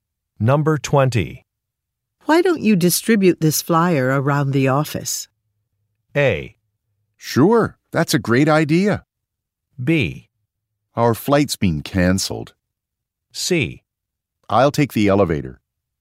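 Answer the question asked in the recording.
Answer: A: Sure, that's a great idea.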